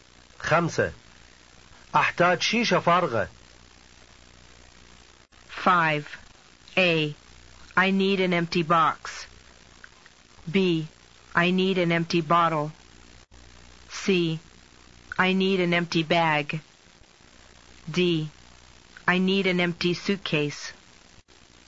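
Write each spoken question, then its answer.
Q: أحتاج شيشة فارغة.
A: B: I need an empty bottle.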